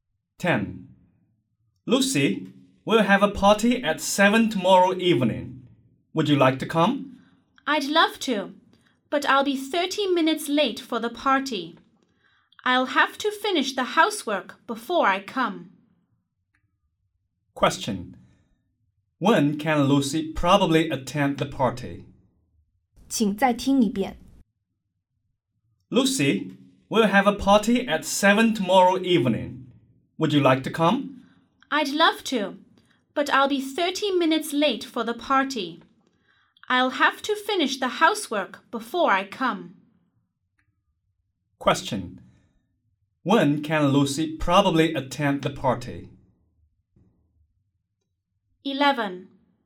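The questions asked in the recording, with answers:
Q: When can Lucy probably attend the party?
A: At 7:30 tomorrow evening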